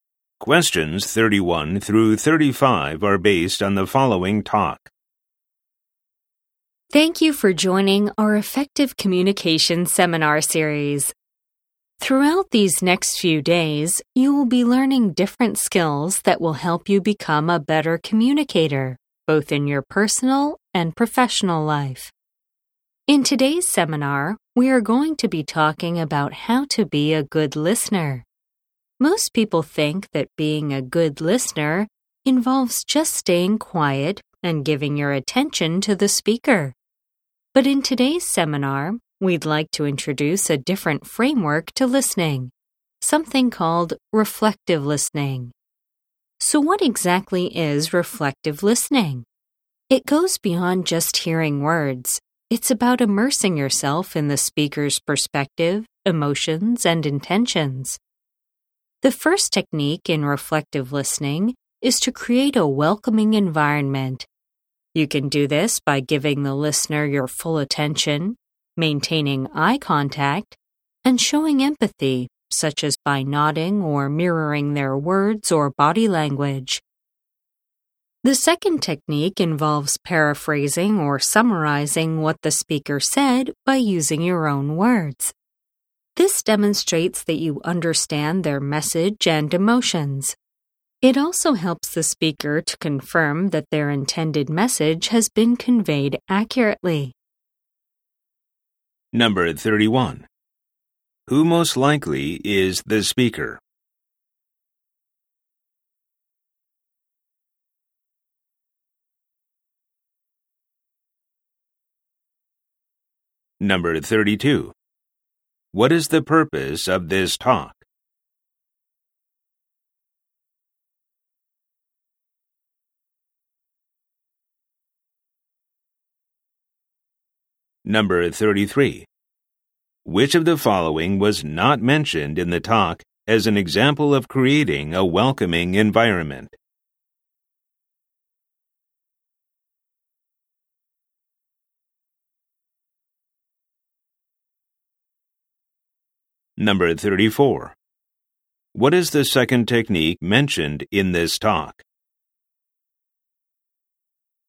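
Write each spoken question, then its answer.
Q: Who most likely is the speaker?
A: A communication seminar instructor

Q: What is the purpose of this talk?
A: To teach reflective listening

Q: What is the second technique mentioned in this talk?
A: Paraphrasing or summarizing what the speaker said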